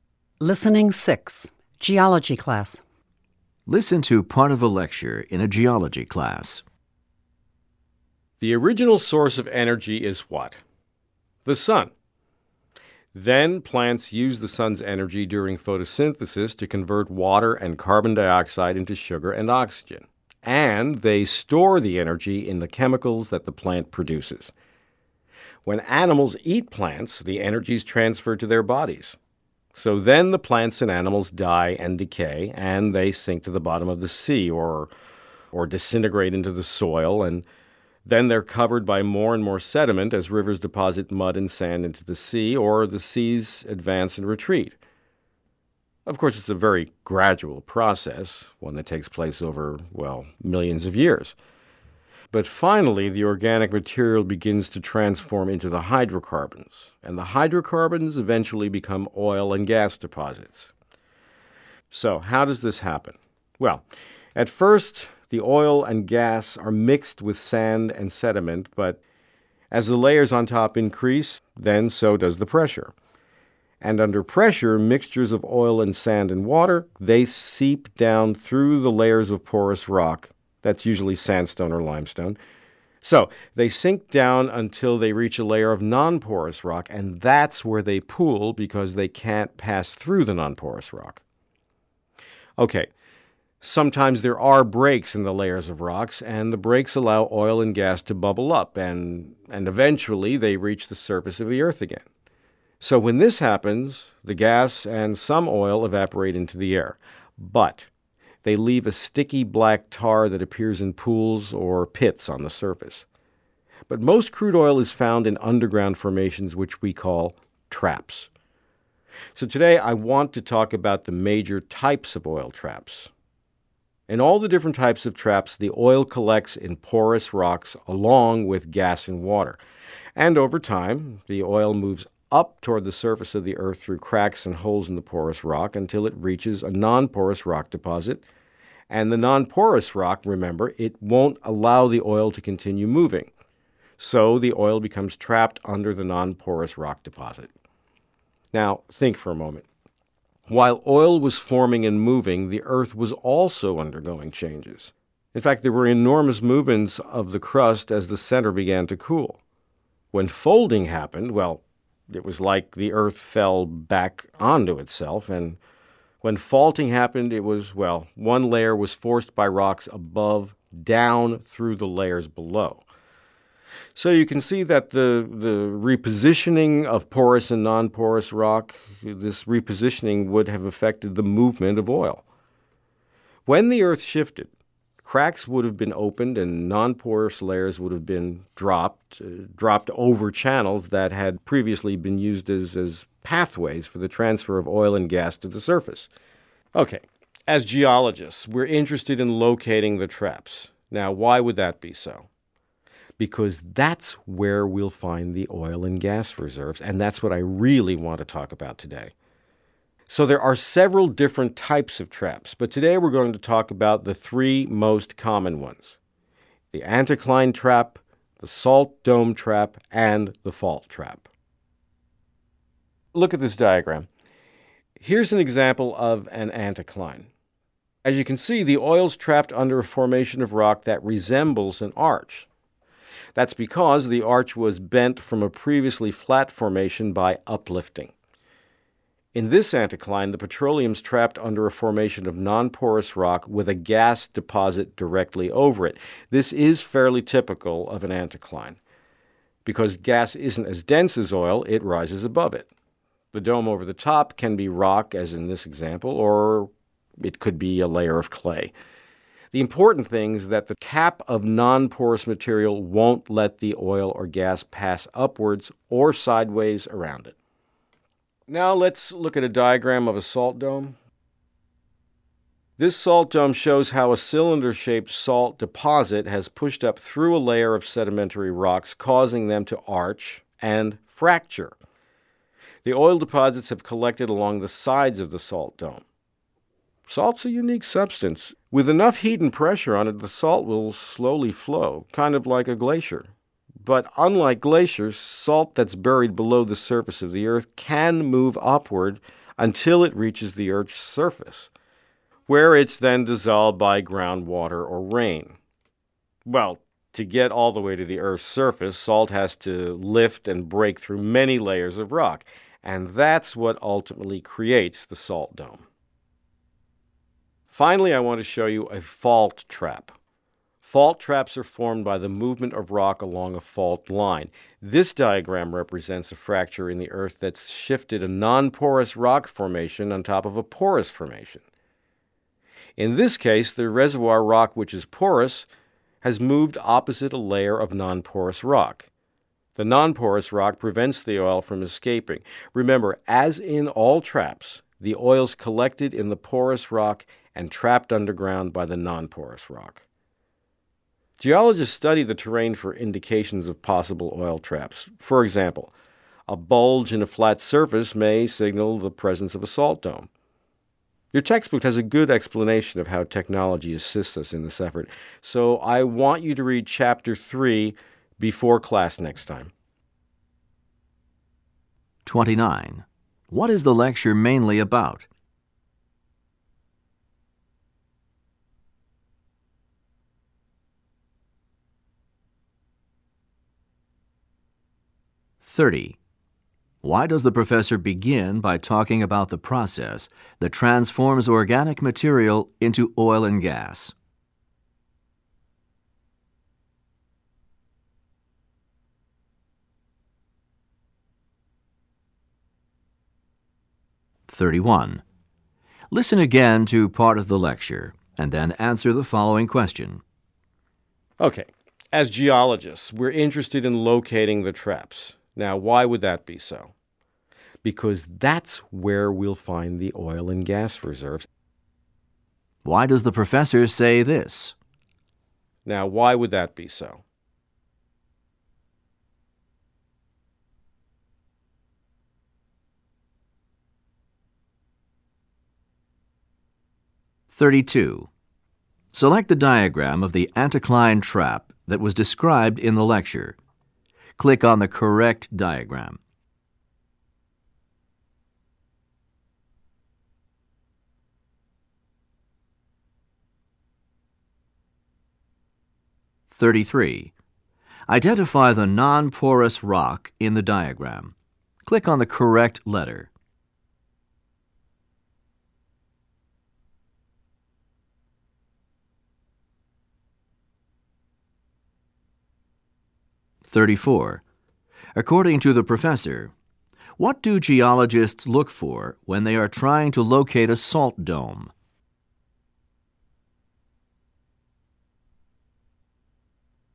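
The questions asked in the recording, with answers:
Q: What is the lecture mainly about?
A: The three most common types of oil traps

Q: Why does the professor say this?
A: To explain why geologists want to locate traps: that is where oil and gas reserves are found

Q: According to the professor, what do geologists look for when they are trying to locate a salt dome?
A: A bulge in a flat surface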